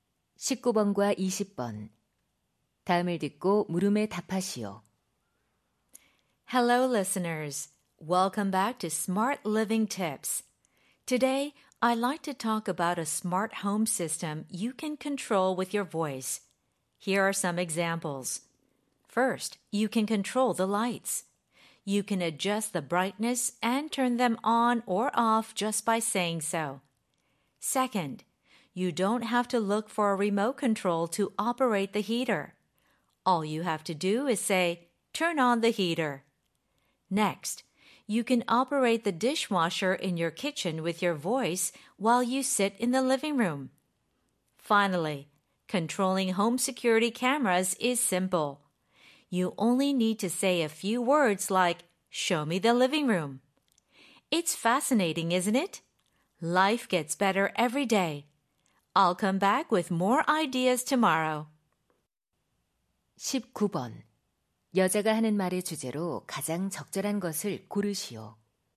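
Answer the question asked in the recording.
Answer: 음성으로 제어하는 스마트 홈 시스템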